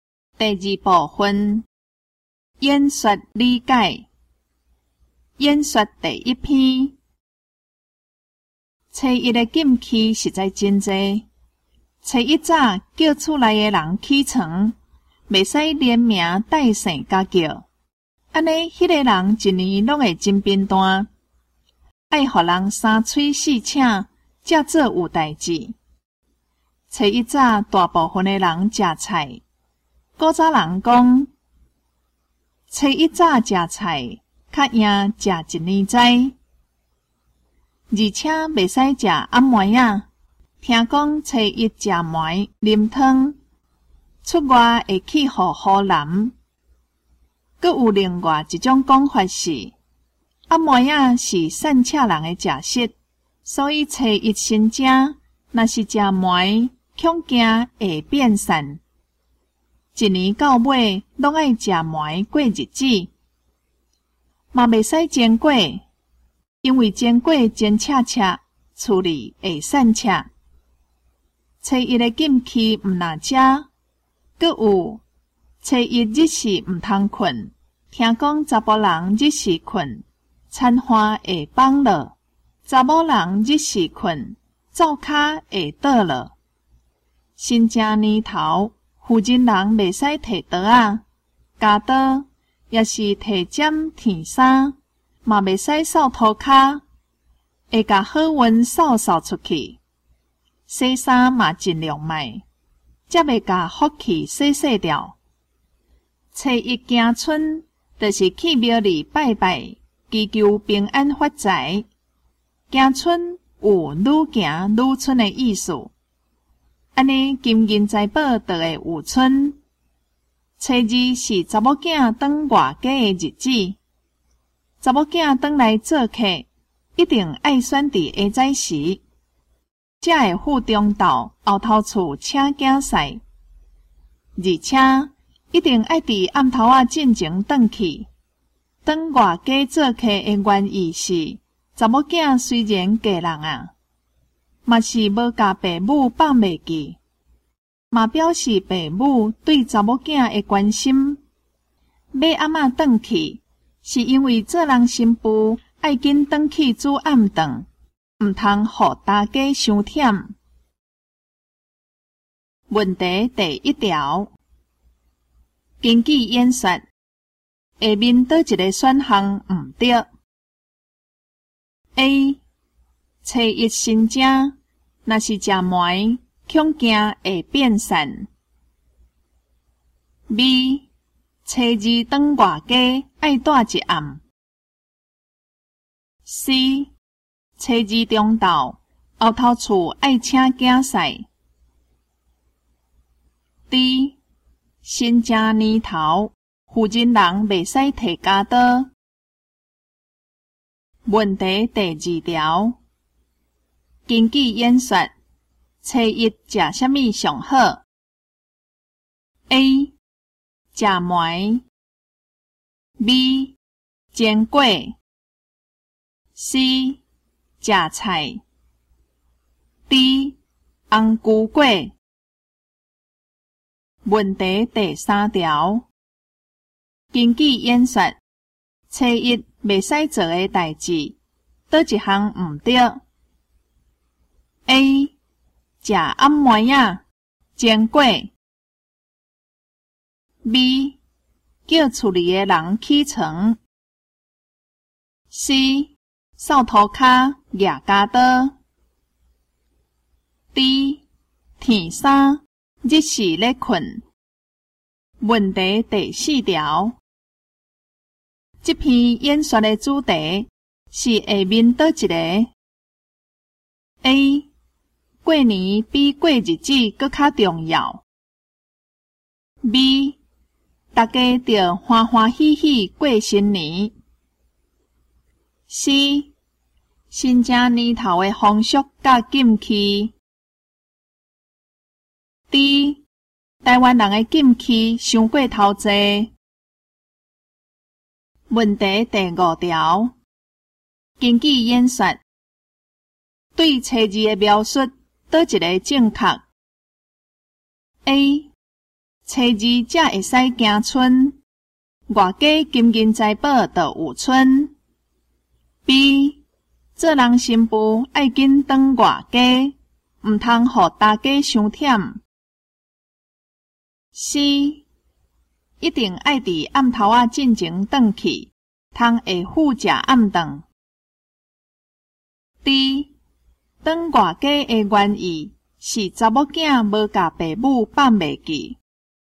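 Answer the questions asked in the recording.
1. B: 初二当外家爱带一暗
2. C: 吃菜
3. B: 叫厝里的人起床
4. C: 新家年头的风俗甲禁忌
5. D: 当外家的原意是查某囝无甲爸母放袂记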